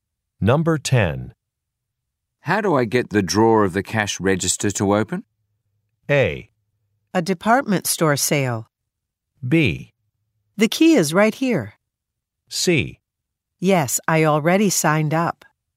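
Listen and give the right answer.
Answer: B: The key is right here.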